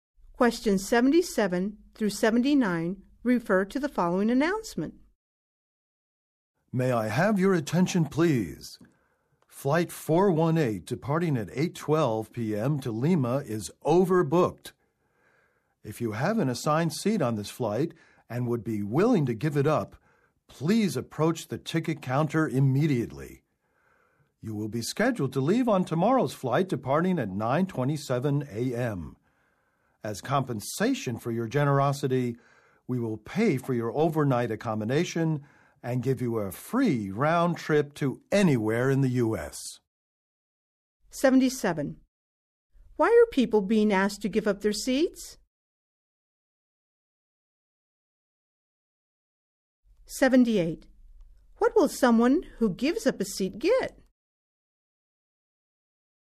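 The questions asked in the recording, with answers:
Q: Why are people being asked to give up their seats?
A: The flight is overbooked

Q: What will someone who gives up a seat get?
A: Free overnight accommodation and a free round trip in the U.S.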